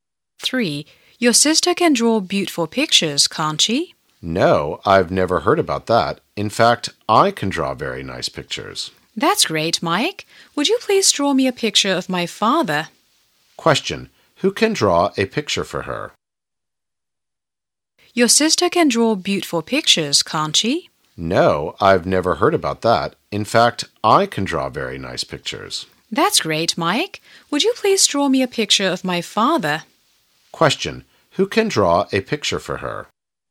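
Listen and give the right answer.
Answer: Mike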